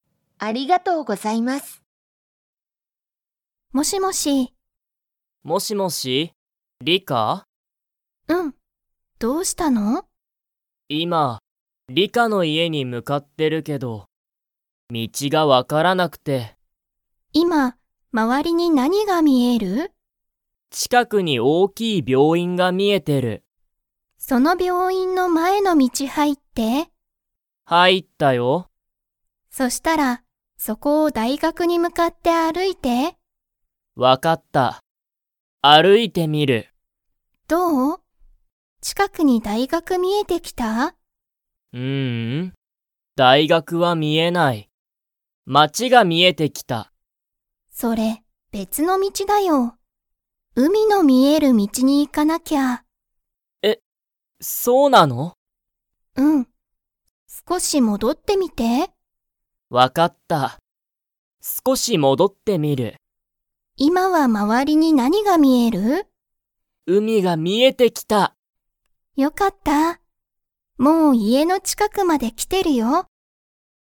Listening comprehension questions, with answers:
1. ナオキは、今いま____に向むかっている。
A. 小ちいさい病院びょういん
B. ナオキの大学だいがく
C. リカの家いえ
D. まわりの道みち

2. ナオキは、海うみが見みえてきましたか?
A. はい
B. いいえ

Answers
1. C
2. A

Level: Level 2

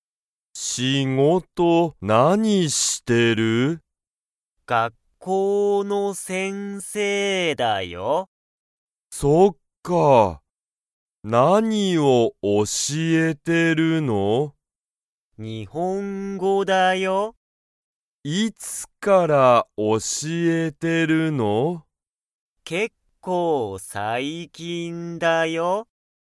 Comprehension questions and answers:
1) ケンタは、____を教(おし)えている。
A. 先生(せんせい)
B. 家族かぞく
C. 仕事(しごと)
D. 日本語(にほんご)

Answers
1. D

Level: Level 1

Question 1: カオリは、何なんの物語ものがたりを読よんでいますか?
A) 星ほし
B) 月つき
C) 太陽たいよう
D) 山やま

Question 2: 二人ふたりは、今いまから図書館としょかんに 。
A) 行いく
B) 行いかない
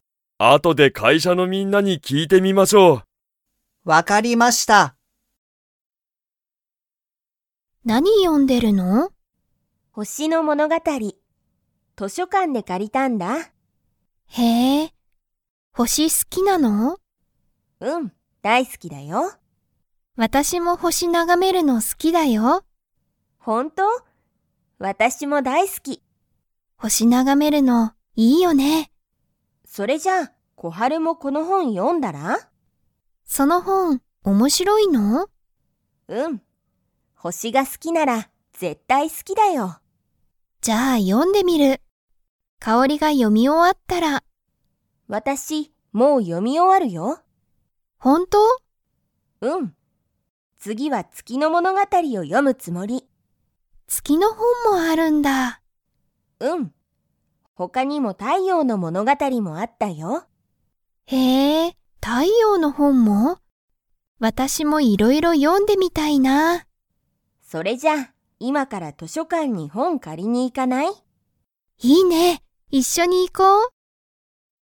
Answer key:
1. A
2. A

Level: Level 4

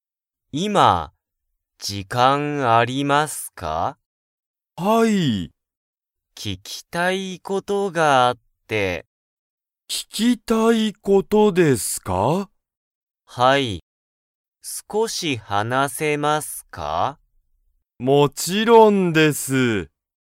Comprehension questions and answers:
Comprehension Quiz (Skip if you don't understand the conversation yet)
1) 鈴木(すずき)さんは、____事(こと)がある。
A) 食(た)べたい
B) 読(よ)みたい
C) 聞(き)きたい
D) 飲(の)みたい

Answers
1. C

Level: Level 1

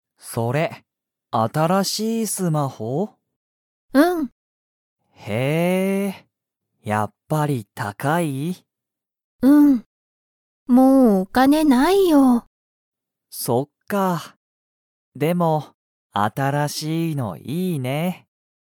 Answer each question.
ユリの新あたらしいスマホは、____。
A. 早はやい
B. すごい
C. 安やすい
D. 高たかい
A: D

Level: Level 1

